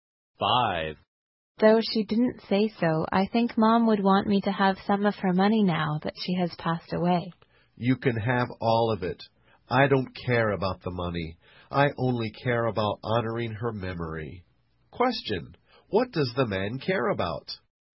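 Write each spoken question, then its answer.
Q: What does the man care about?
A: Honoring his mother's memory.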